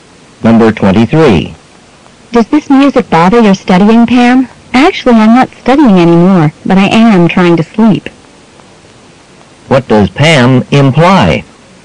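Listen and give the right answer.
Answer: The music is keeping her from sleeping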